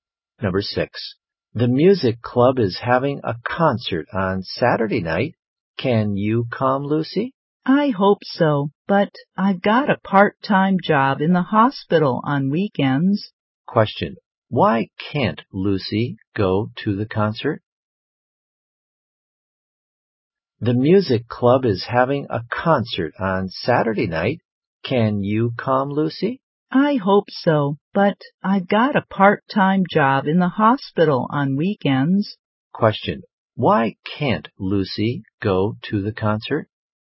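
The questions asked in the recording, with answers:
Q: why can't Lucy go to the concert?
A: She has a part-time job in the hospital on weekends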